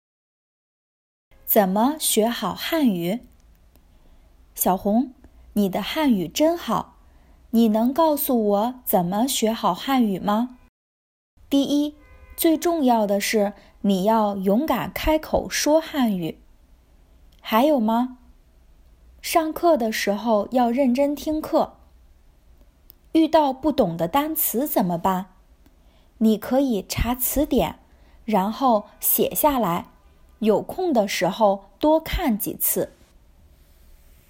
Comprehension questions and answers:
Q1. 小红觉得学汉语最重要的是什么?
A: 开口说汉语

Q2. 小红觉得遇到不懂的单词应该怎么做?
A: 查词典

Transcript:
怎么学好汉语?
小明:小红,你的汉语真好,你能告诉我怎么学好汉语吗?
小红:第一,最重要的是你要勇敢开口说汉语!
小明:还有吗?
小红:上课的时候要认真听课。
小明:遇到不懂的单词怎么办?
小红:你可以查词典,然后写下来,有空的时候多看几次。

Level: intermediate